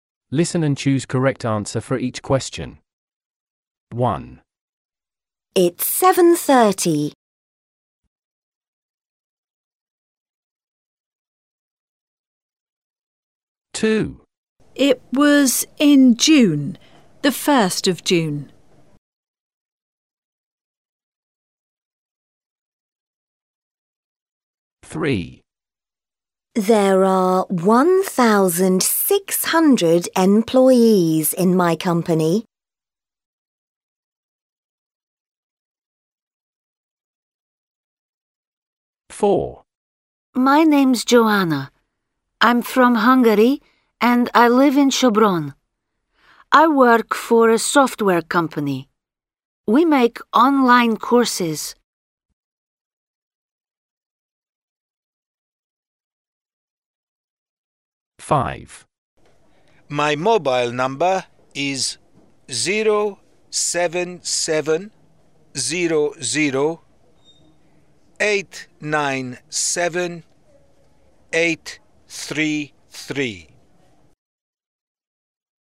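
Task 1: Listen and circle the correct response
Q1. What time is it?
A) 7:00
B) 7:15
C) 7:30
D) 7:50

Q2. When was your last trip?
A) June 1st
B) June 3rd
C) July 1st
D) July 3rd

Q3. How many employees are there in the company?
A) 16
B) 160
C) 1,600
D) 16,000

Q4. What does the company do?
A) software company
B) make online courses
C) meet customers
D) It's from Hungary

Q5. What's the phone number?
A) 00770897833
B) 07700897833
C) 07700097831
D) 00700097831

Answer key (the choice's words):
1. 7:30
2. June 1st
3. 1,600
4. make online courses
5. 07700897833

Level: A0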